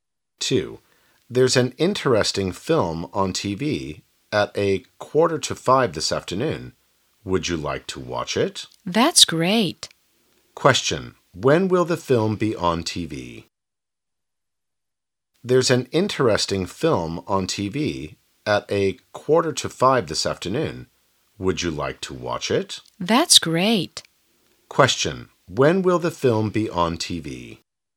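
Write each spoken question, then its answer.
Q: When will the film be on TV?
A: At 4:45 this afternoon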